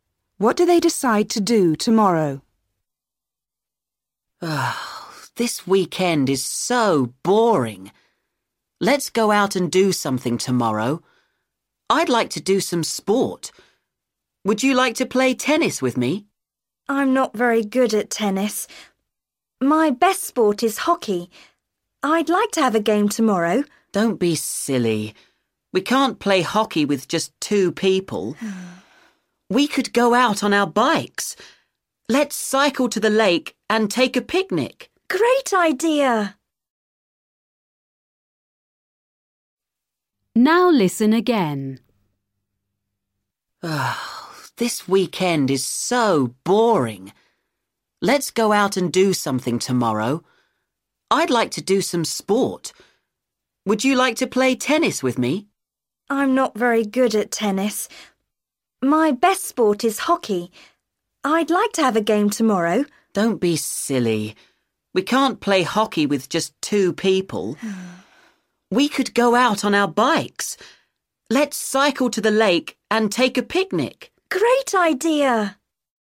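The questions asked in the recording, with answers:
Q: What do they decide to do tomorrow?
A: Cycle to the lake and have a picnic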